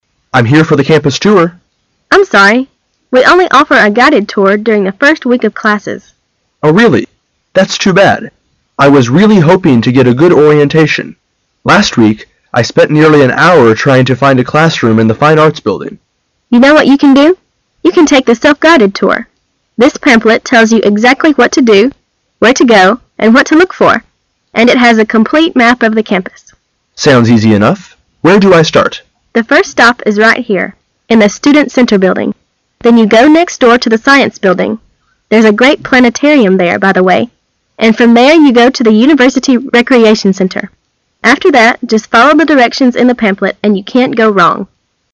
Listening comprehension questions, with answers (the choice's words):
Questions 5 to 7 are based on the following conversation. At the end of the conversation, you will be given 15 seconds to answer the questions. Now listen to the conversation.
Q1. What did the man have difficulty locating the week before?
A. A tour guide.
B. A classroom.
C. A map.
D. Maps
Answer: A classroom.

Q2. Where does the self-guided tour start?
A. In the Science Building.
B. In the Student Center Building.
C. In the University Recreation Center.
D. In the University.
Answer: In the Student Center Building.

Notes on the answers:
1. 弄清细节,那个男人遇到了什么困难。 [详细解答] The man said:"I was really hoping to get a good orientation.I spend nearly an hour trying to find classroom."因此A、C、D与本题无关,故正确答案为B。
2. 明白细节。The self-guided tour的起点。 [详细解答] 对话中有一句,"The self-guided tour is available,the pamphlet can tell you everything.The first stop is right here,in the Student Center Building".因此 the self-guided tour的起点是B。

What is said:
[解析] 5-7 M: I'm here for the campus tour. F: I'm sorry. We only offer a guided tour during the first week of classes. M: Oh, really? That's too bad. I was really hoping to get a good orientation. Last week, I spent nearly an hour trying to find a classroom in the Fine Arts Building. F: You know what you can do——you can take the self- guided tour. This pamphlet tells you exactly what to do, where to go, and what to look for, and it has a complete map of the campus. M: Sounds easy enough——where do I start? F: The first stop is right here, in the Student Center Building. Then you go next door to the Science Building there's a great planetarium there, by the way——and from there you go to the University Recreation Center. After that, just follow the directions in the pamphlet and you can't go wrong.